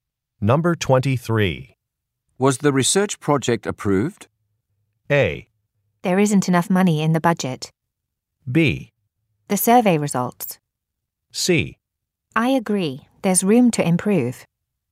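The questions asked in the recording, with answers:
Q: Was the research project approved?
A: A: There isn't enough money in the budget.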